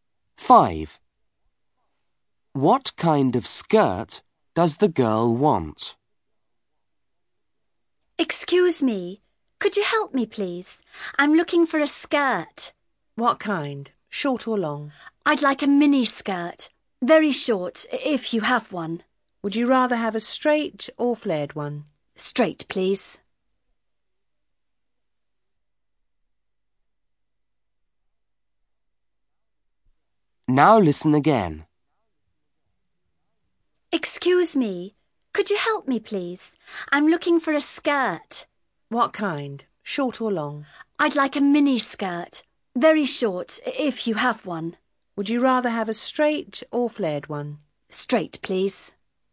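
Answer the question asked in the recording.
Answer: A short, straight mini skirt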